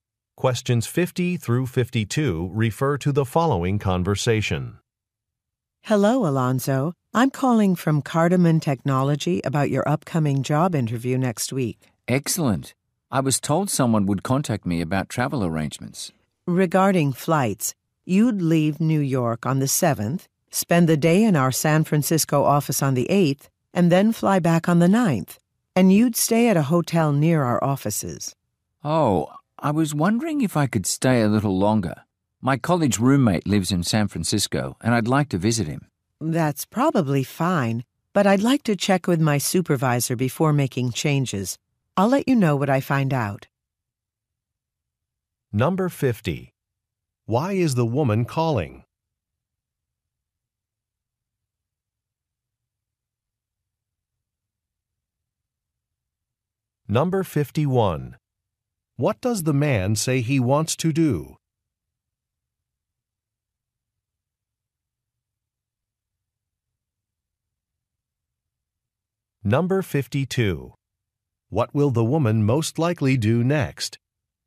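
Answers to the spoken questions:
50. To discuss travel arrangements for a job interview
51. Stay longer to visit a friend
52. Check with her supervisor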